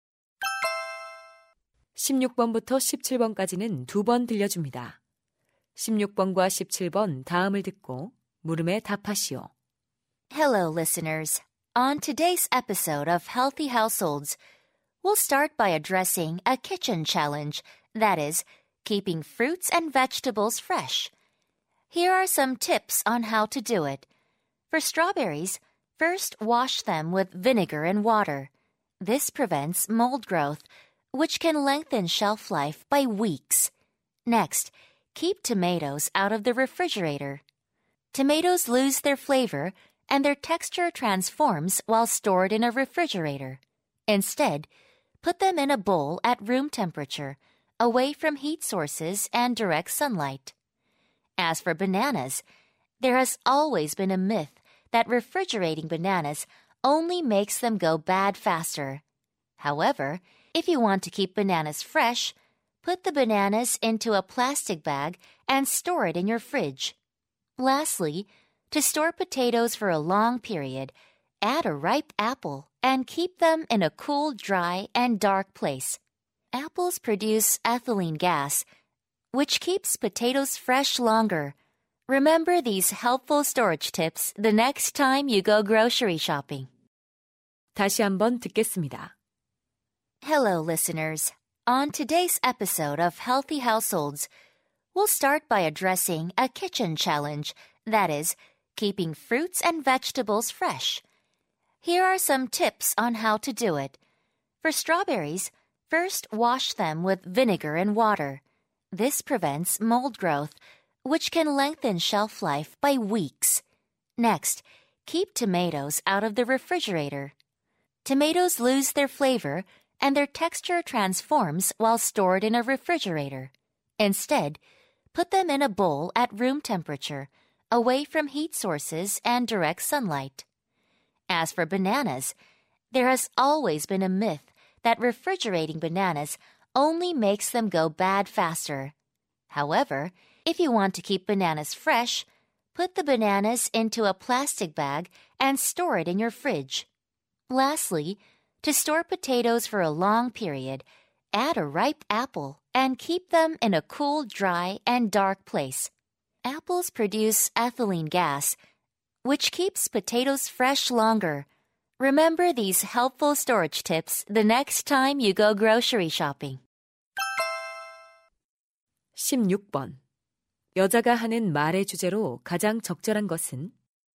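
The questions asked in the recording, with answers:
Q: 여자가 하는 말의 주제로 가장 적절한 것은?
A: 과일과 채소를 신선하게 보관하는 방법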